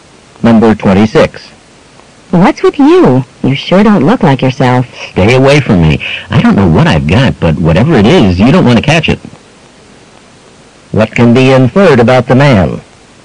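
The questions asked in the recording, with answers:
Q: What can be inferred about the man?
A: He is sick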